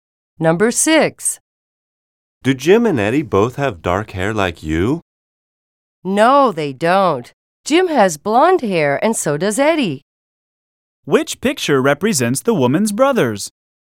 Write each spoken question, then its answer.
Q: Which picture represents the woman's brothers?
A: In picture F, both men have blonde hair.